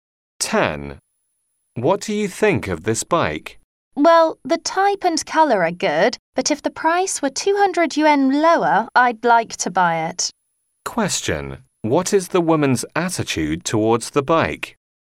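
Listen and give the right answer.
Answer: She likes it but thinks it's too expensive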